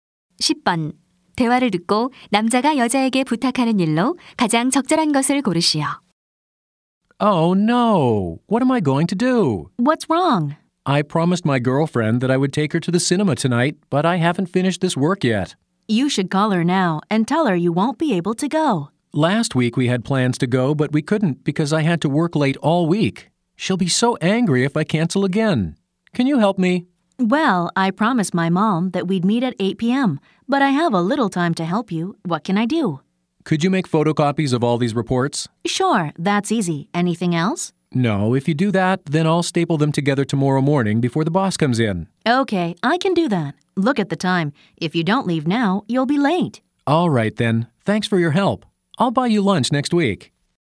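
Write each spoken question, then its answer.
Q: 대화를 듣고 남자가 여자에게 부탁하는 일로 가장 적절한 것을 고르시오.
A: 보고서를 모두 복사하기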